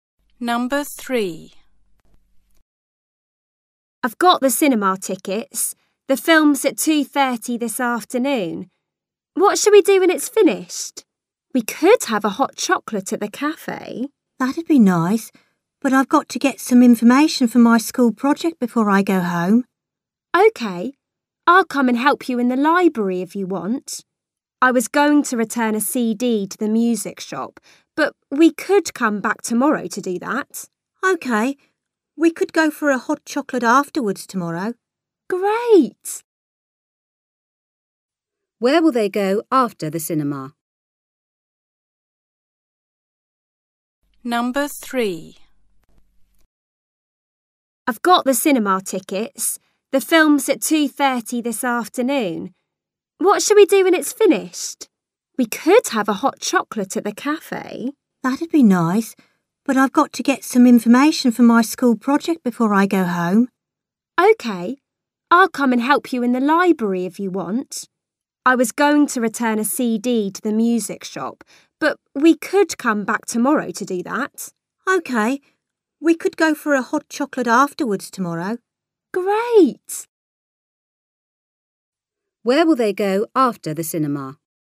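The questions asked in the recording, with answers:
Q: Where will they go after the cinema?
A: The library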